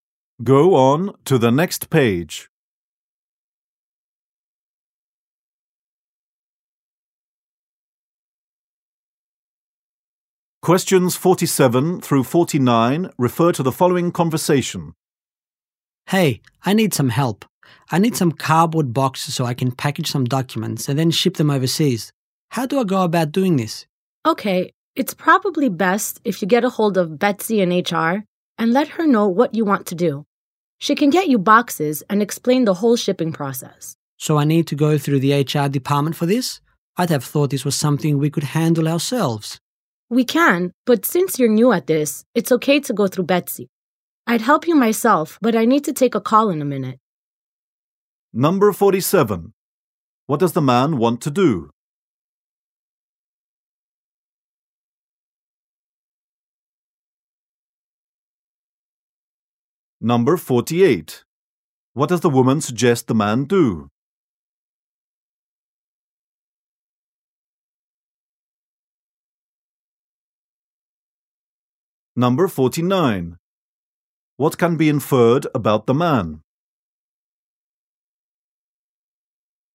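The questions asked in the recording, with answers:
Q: What does the man want to do?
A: Ship documents overseas

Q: What does the woman suggest the man do?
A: Contact Betsy in HR

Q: What can be inferred about the man?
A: He is new at this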